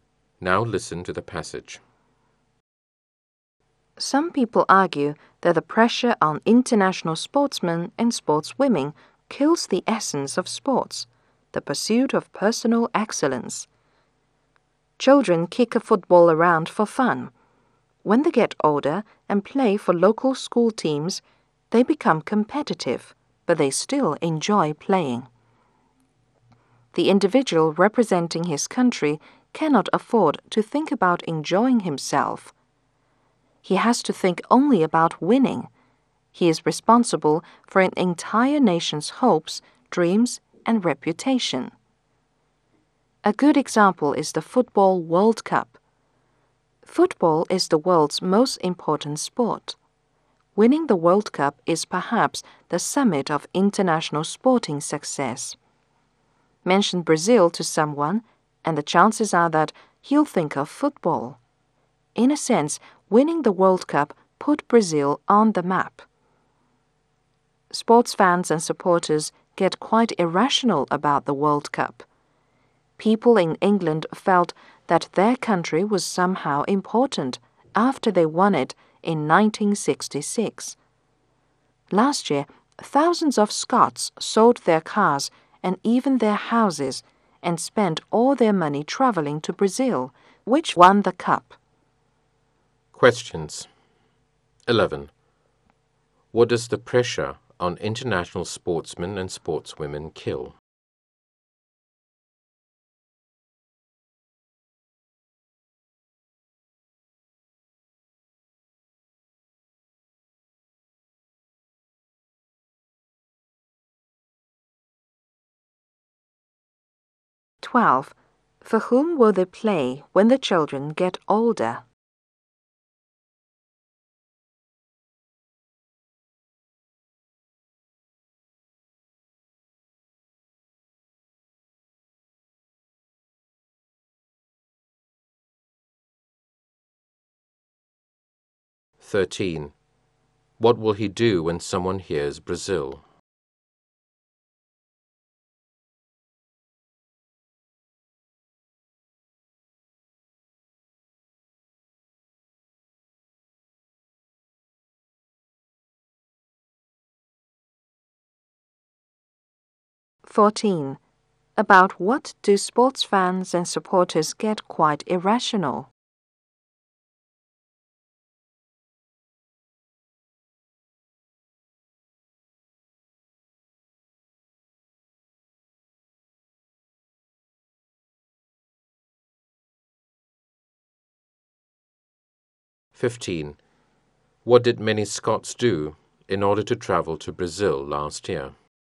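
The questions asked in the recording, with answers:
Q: What does the pressure on international sportsmen and sportswomen kill?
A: The essence of sports

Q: For whom will they play when the children get older?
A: Local school teams

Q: What will he do when someone hears Brazil?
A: Think of football

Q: About what do sports fans and supporters get quite irrational?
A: The World Cup

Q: What did many Scots do in order to travel to Brazil last year?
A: Sold their cars and houses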